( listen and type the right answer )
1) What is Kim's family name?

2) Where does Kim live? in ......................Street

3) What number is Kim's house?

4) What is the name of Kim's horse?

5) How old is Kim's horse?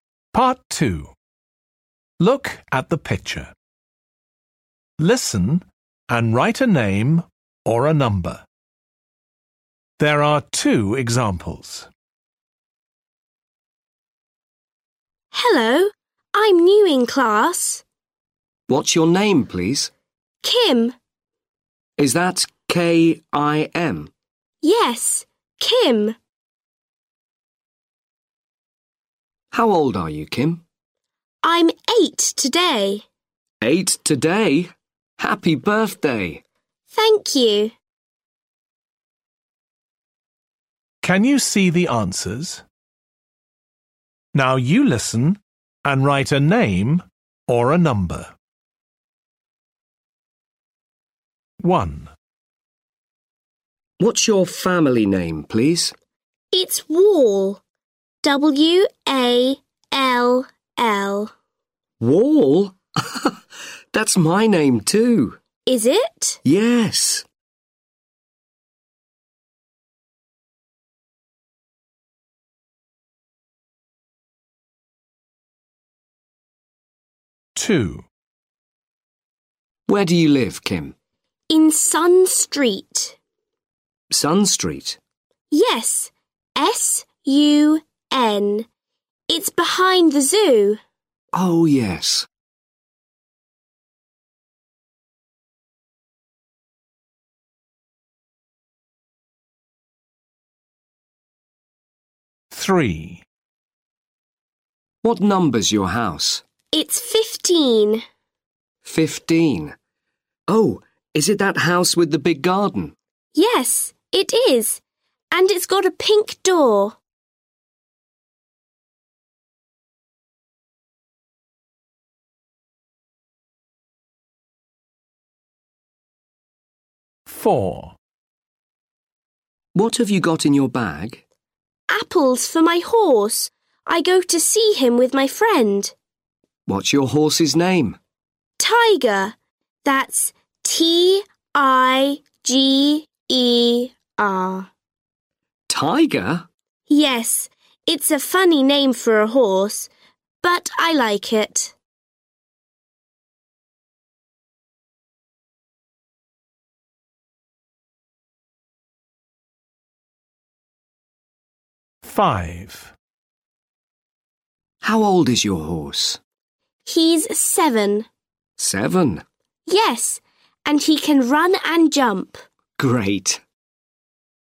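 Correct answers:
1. Wall
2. Sun
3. 15
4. Tiger
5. 7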